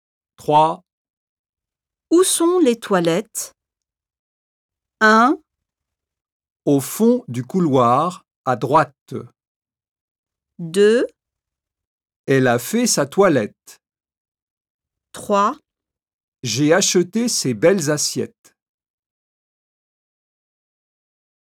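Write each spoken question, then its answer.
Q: Où sont les toilettes?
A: 1: Au fond du couloir, à droite.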